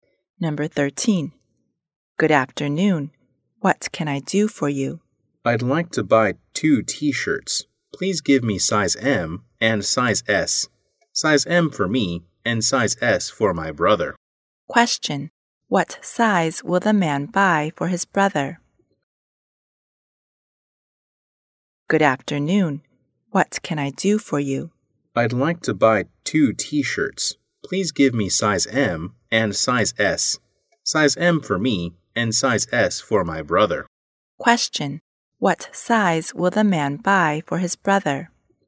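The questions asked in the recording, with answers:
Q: What size will the man buy for his brother?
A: Size S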